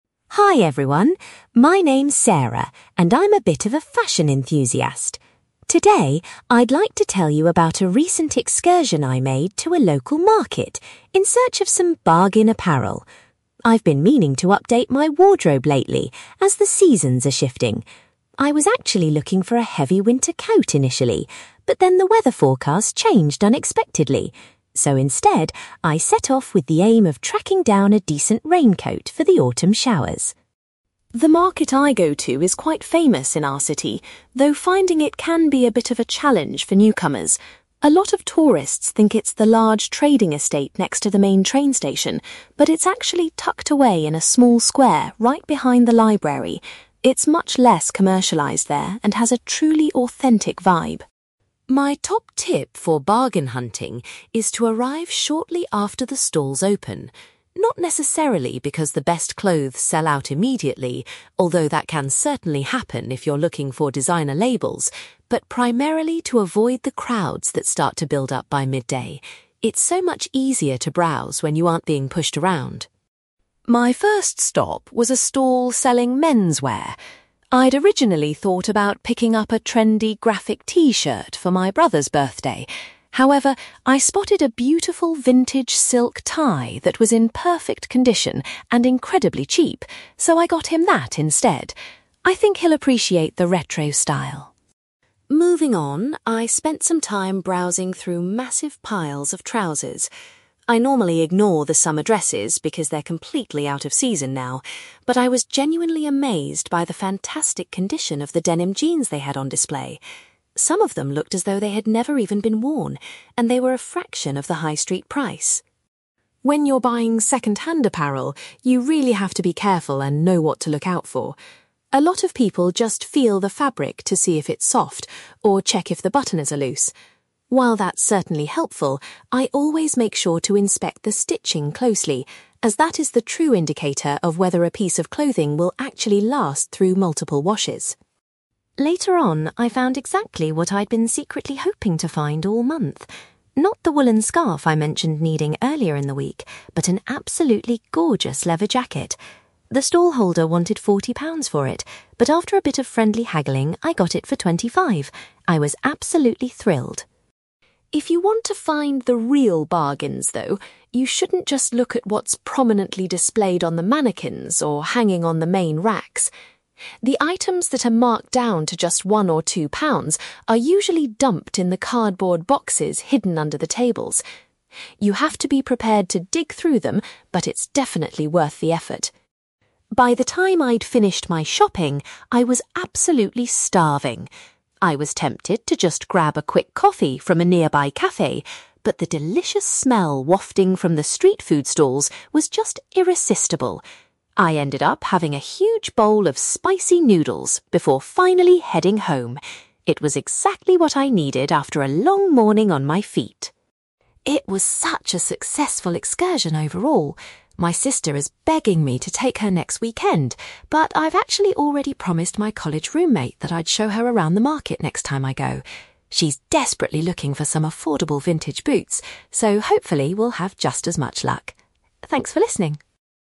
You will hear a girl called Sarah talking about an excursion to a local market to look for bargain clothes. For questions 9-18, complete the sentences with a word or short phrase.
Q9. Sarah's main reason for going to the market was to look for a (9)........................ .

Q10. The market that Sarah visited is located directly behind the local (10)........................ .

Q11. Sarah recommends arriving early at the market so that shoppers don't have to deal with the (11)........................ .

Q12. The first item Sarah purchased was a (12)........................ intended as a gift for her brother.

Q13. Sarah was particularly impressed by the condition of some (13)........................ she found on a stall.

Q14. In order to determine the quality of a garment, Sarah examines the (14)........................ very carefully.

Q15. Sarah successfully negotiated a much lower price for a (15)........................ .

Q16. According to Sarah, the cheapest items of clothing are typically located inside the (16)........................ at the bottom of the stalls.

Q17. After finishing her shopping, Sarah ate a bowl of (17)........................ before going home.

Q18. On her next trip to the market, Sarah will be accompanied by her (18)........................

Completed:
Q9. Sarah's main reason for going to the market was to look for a raincoat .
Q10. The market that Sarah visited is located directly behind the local library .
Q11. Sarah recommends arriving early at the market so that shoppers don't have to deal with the crowds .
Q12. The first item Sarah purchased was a silk tie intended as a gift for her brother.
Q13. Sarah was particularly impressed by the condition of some denim jeans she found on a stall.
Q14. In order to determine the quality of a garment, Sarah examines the stitching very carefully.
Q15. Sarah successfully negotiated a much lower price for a leather jacket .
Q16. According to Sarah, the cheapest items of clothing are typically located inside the cardboard boxes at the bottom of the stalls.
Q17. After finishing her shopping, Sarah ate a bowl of spicy noodles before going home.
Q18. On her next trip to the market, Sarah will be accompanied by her college roommate

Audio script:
Sarah: Hi everyone, my name's Sarah and I'm a bit of a fashion enthusiast. Today, I'd like to tell you about a recent excursion I made to a local market in search of some bargain apparel. I've been meaning to update my wardrobe lately, as the seasons are shifting. I was actually looking for a heavy winter coat initially, but then the weather forecast changed unexpectedly. So, instead, I set off with the aim of tracking down a decent raincoat for the autumn showers.
The market I go to is quite famous in our city, though finding it can be a bit of a challenge for newcomers. A lot of tourists think it's the large trading estate next to the main train station, but it's actually tucked away in a small square right behind the library. It's much less commercialised there and has a truly authentic vibe.
My top tip for bargain hunting is to arrive shortly after the stalls open. Not necessarily because the best clothes sell out immediately—although that can certainly happen if you're looking for designer labels—but primarily to avoid the crowds that start to build up by midday. It's so much easier to browse when you aren't being pushed around!
My first stop was a stall selling menswear. I'd originally thought about picking up a trendy graphic t-shirt for my brother's birthday. However, I spotted a beautiful vintage silk tie that was in perfect condition and incredibly cheap, so I got him that instead. I think he'll appreciate the retro style.
Moving on, I spent some time browsing through massive piles of trousers. I normally ignore the summer dresses because they're completely out of season now, but I was genuinely amazed by the fantastic condition of the denim jeans they had on display. Some of them looked as though they had never even been worn, and they were a fraction of the high-street price.
When you're buying second-hand apparel, you really have to be careful and know what to look out for. A lot of people just feel the fabric to see if it's soft, or check if the buttons are loose. While that's certainly helpful, I always make sure to inspect the stitching closely, as that is the true indicator of whether a piece of clothing will actually last through multiple washes.
Later on, I found exactly what I'd been secretly hoping to find all month. Not the woollen scarf I mentioned needing earlier in the week, but an absolutely gorgeous leather jacket. The stallholder wanted forty pounds for it, but after a bit of friendly haggling, I got it for twenty-five! I was absolutely thrilled.
If you want to find the real bargains, though, you shouldn't just look at what's prominently displayed on the mannequins or hanging on the main racks. The items that are marked down to just one or two pounds are usually dumped in the cardboard boxes hidden under the tables. You have to be prepared to dig through them, but it's definitely worth the effort.
By the time I'd finished my shopping, I was absolutely starving. I was tempted to just grab a quick coffee from a nearby café, but the delicious smell wafting from the street food stalls was just irresistible. I ended up having a huge bowl of spicy noodles before finally heading home. It was exactly what I needed after a long morning on my feet.
It was such a successful excursion overall. My sister is begging me to take her next weekend, but I've actually already promised my college roommate that I'd show her around the market next time I go. She's desperately looking for some affordable vintage boots, so hopefully, we'll have just as much luck. Thanks for listening!

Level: B2